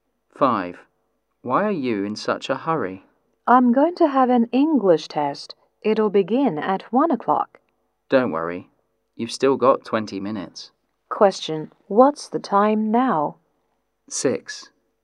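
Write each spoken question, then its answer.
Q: What's the time now?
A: 12:40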